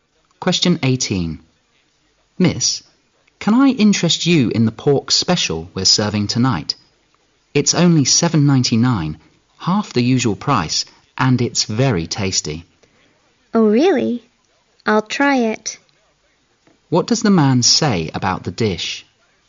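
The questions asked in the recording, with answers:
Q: What does the man say about the dish?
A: It's half price and very tasty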